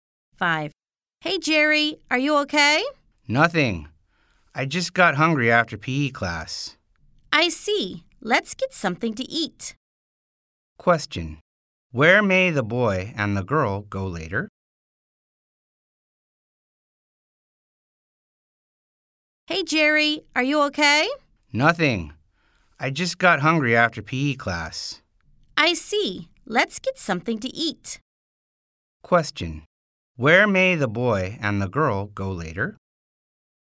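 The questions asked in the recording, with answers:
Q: Where may the boy and the girl go later?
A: Somewhere to eat, like a restaurant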